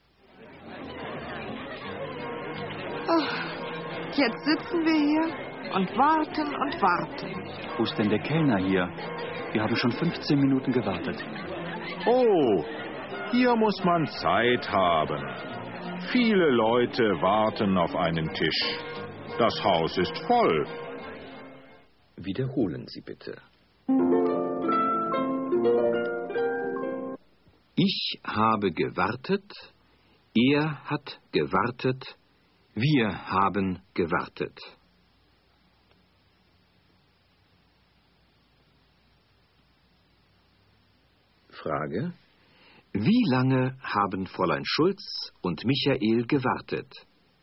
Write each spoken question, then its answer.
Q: Frage. Wie lange haben Fräulein Schulz und Michael gewartet?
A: Sie haben schon 15 Minuten gewartet.